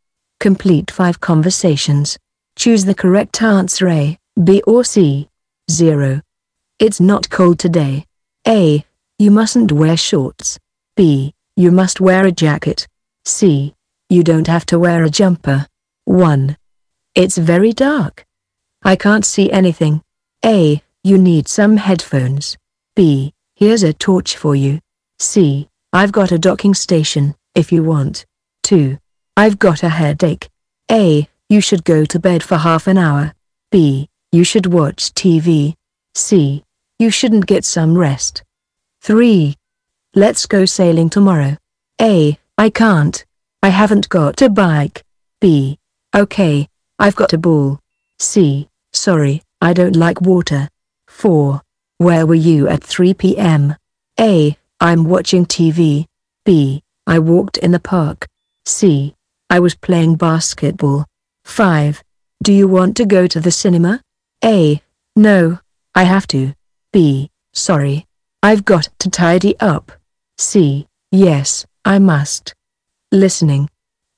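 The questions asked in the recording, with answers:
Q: It's very dark. I can't see anything.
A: B: Here's a torch for you.

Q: I've got a headache.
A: A: You should go to bed for half an hour.

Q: Let's go sailing tomorrow.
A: C: Sorry, I don't like water.

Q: Where were you at 3 p.m.?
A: C: I was playing basketball.

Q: Do you want to go to the cinema?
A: B: Sorry, I've got to tidy up.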